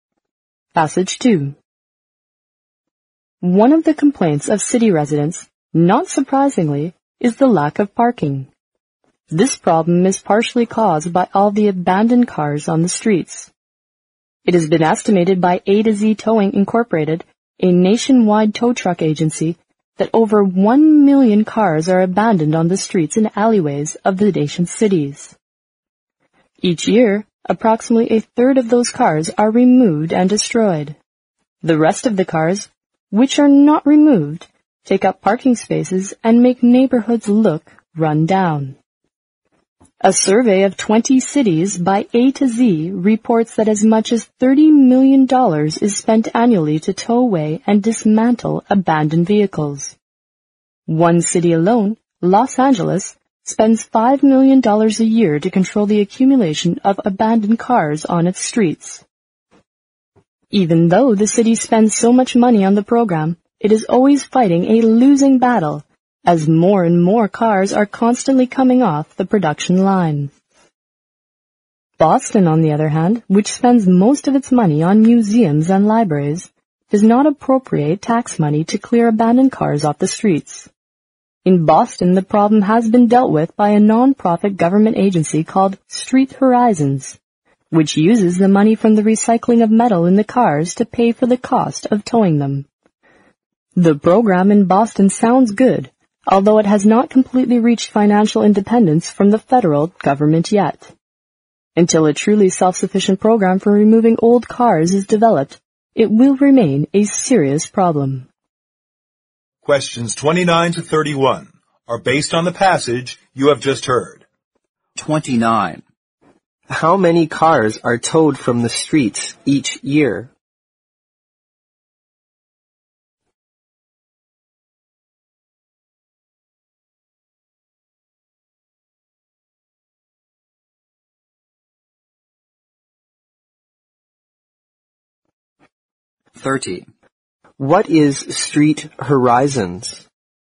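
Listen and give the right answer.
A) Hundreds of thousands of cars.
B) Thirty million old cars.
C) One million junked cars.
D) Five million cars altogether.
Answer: A) Hundreds of thousands of cars.

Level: 英语四级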